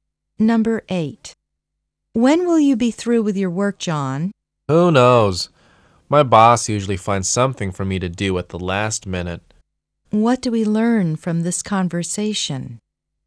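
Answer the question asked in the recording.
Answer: John doesn't know when he'll finish because his boss often gives him last-minute work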